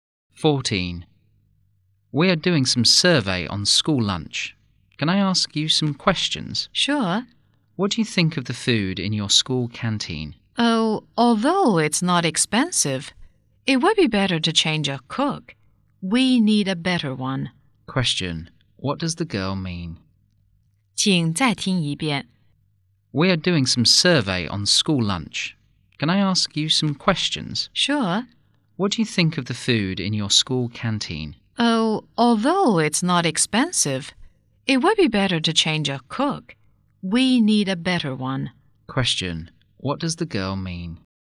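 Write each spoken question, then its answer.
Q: What does the girl mean?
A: The canteen needs a better cook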